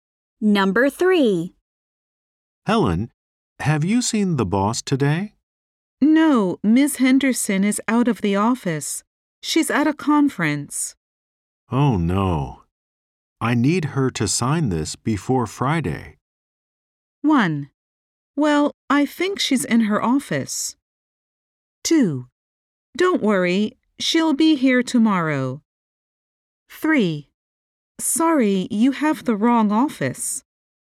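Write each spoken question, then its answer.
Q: Oh, no. I need her to sign this before Friday.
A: 2: Don't worry, she'll be here tomorrow.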